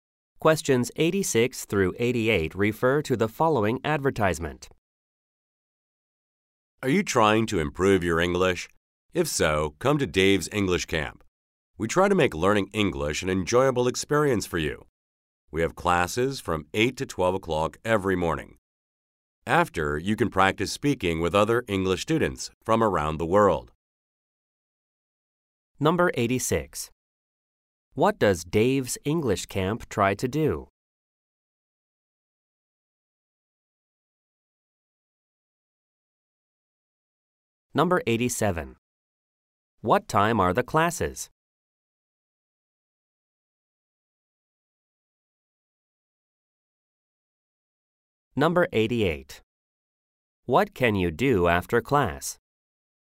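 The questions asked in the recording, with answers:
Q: What does Dave's English Camp try to do?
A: Make learning English enjoyable

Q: What time are the classes?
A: From 8 to 12 every morning

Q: What can you do after class?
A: Practice speaking with other English students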